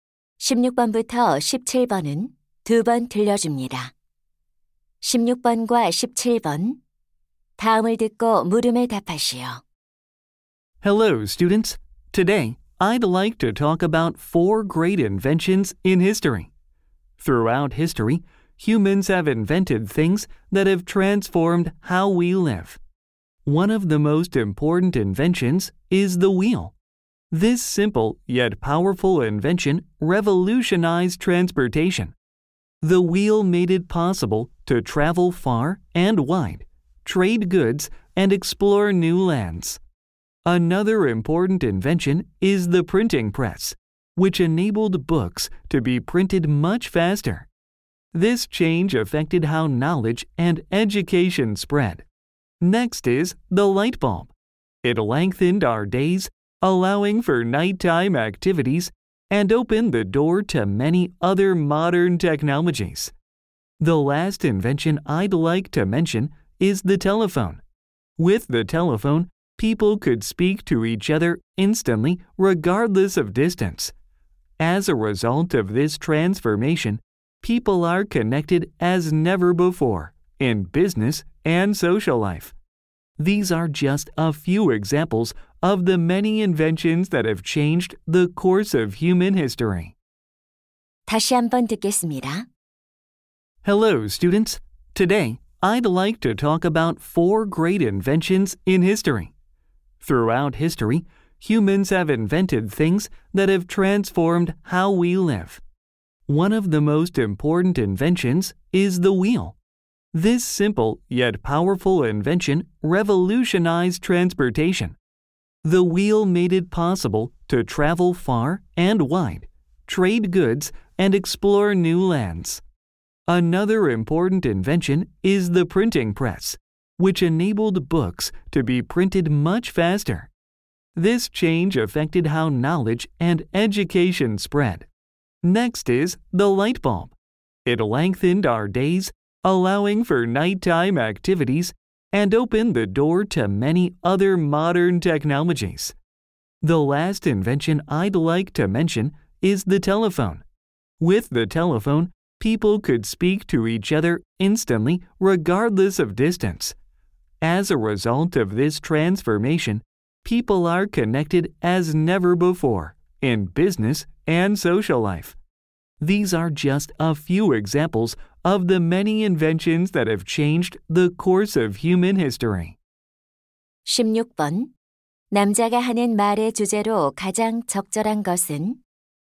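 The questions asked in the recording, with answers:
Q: 남자가 하는 말의 주제로 가장 적절한 것은?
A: 인류의 삶을 바꾼 위대한 발명품들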